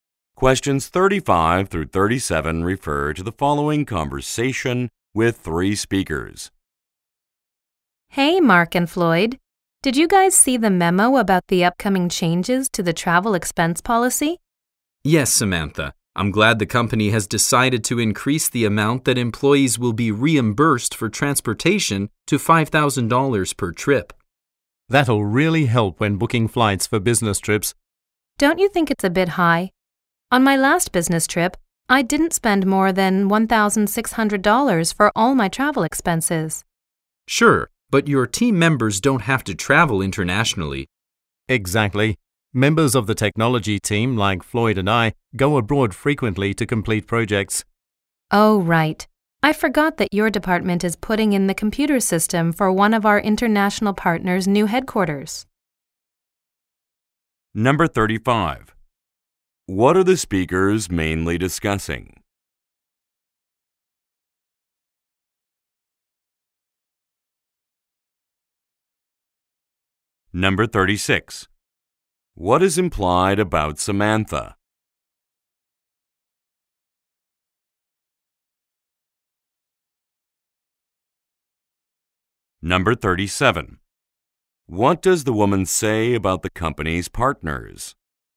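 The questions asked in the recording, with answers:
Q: What are the speakers mainly discussing?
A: Changes to the travel expense policy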